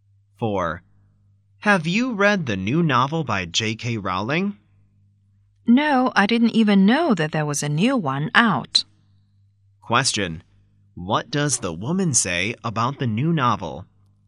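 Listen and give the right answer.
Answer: She didn't know there was a new one out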